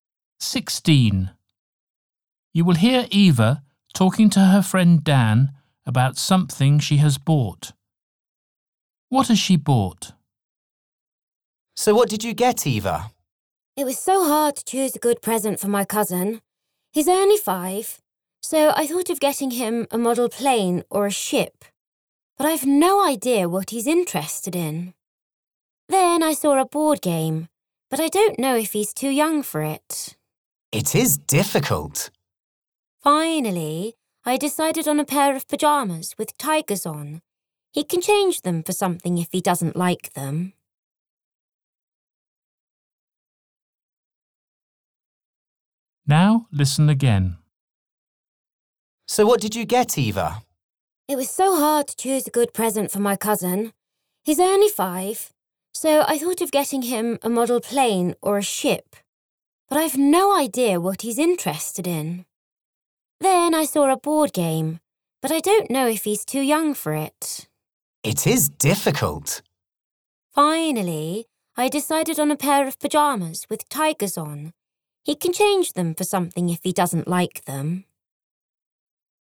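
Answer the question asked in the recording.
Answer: A pair of pyjamas with tigers on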